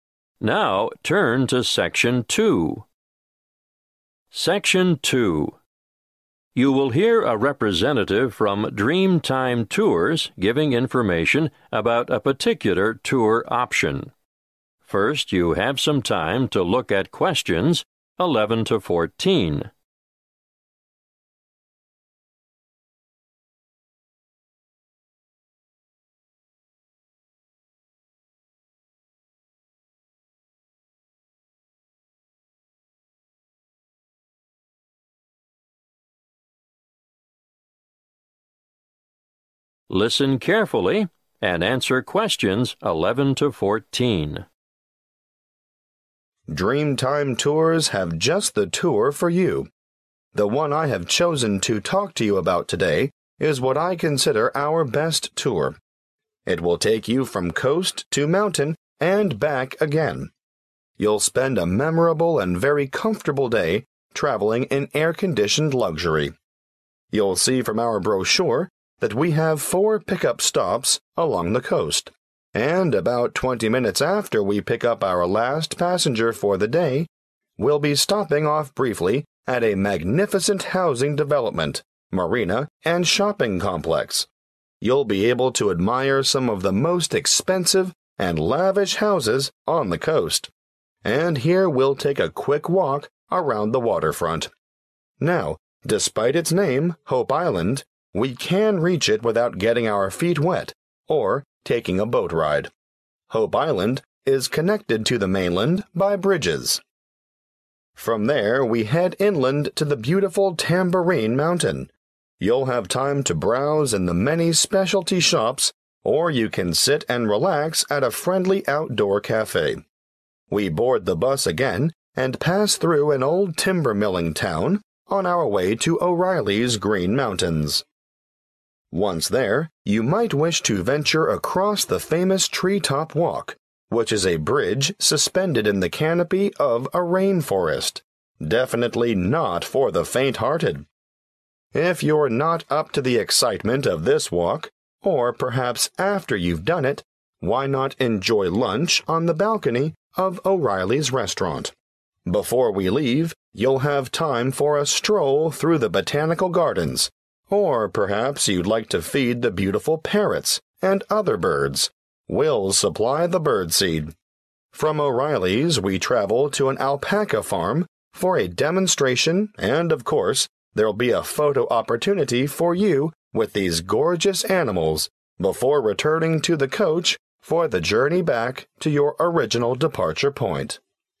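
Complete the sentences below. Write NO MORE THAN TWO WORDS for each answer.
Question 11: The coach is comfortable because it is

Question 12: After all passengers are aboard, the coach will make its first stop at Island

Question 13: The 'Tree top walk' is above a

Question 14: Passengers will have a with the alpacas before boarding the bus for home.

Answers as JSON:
{"11": "air-conditioned", "12": "Hope", "13": "rainforest", "14": "photo opportunity"}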